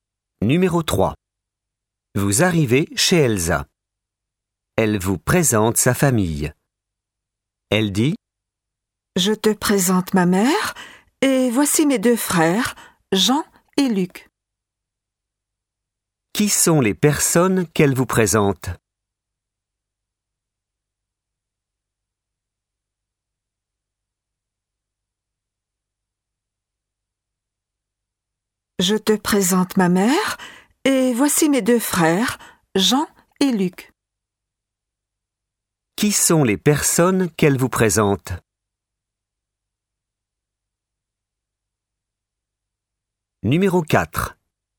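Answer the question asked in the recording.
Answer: Sa mère et ses deux frères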